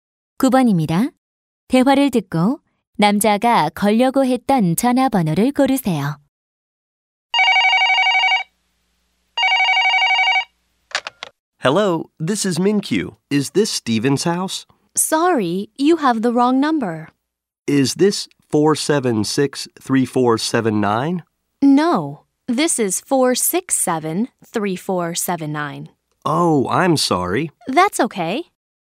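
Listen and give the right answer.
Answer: 476-3479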